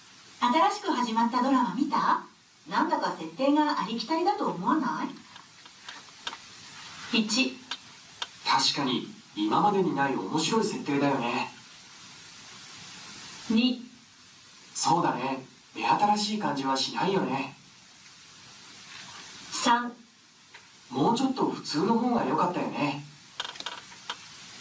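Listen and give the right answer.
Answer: 2: そうだね、目新しい感じはしないよね。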